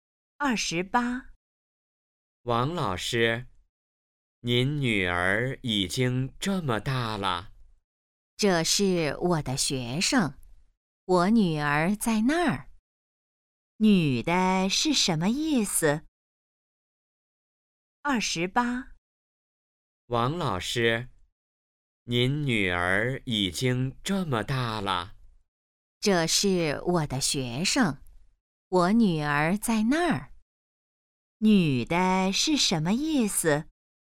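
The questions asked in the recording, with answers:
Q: 女的是什么意思?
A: 那是她的学生,不是她女儿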